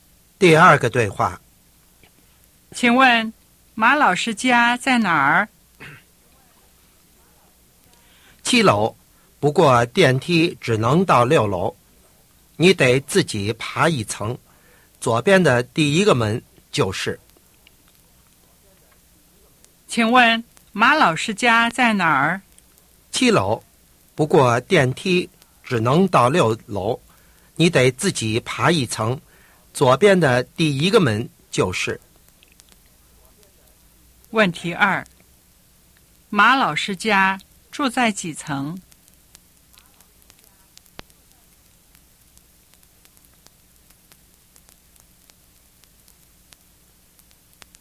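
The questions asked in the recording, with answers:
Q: 马老师家住在几层?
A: 七楼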